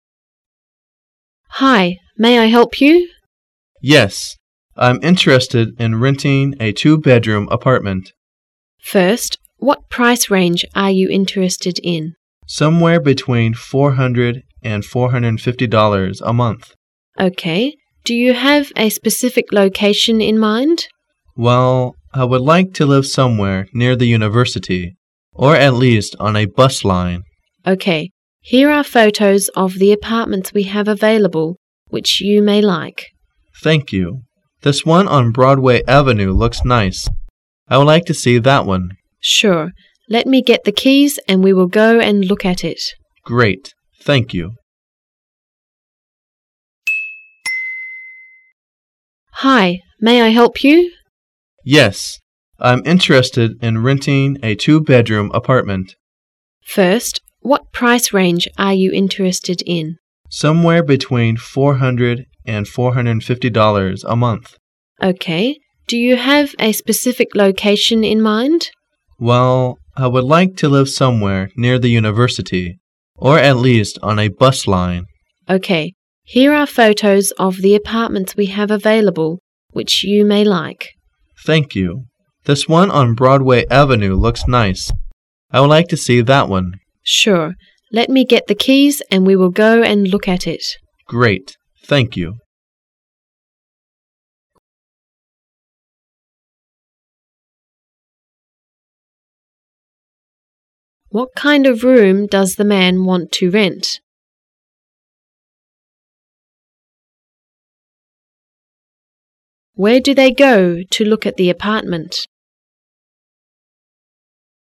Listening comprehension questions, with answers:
Where do they go to look at the apartment?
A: To Broadway Avenue.